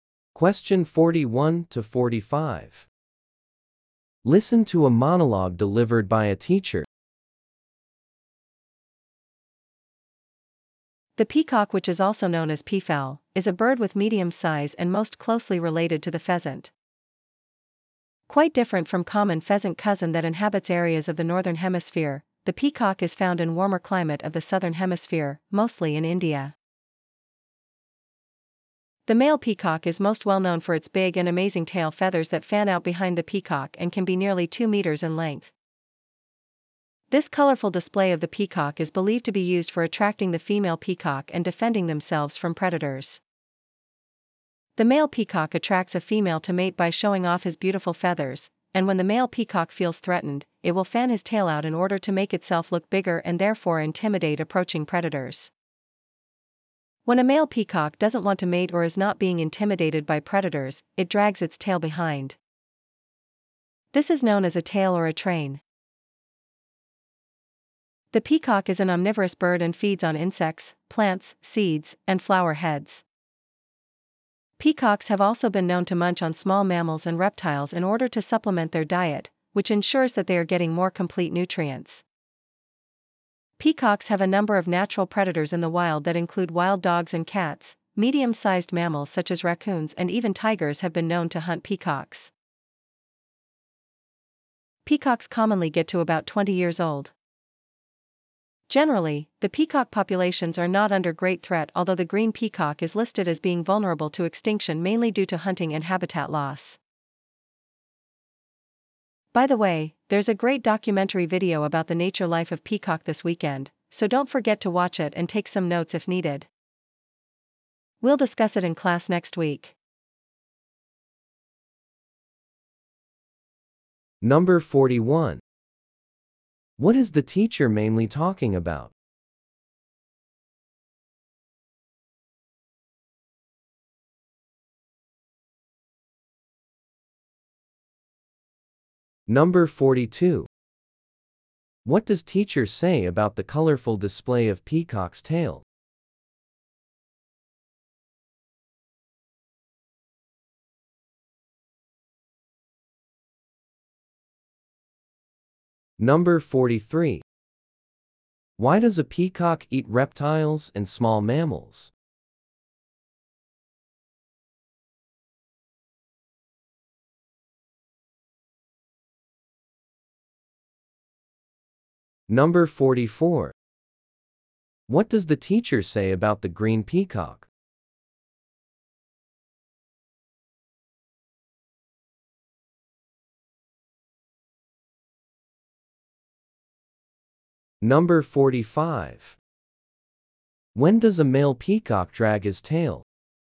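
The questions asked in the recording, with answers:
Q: What is the teacher mainly talking about?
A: Peacocks.

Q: What does teacher say about the colorful display of peacock's tail?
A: It attracts females and scares predators.

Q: Why does a peacock eat reptiles and small mammals?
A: To get more complete nutrients.

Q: What does the teacher say about the green peacock?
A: It is vulnerable to extinction.

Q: When does a male peacock drag his tail?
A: When he doesn't want to mate and isn't threatened by predators.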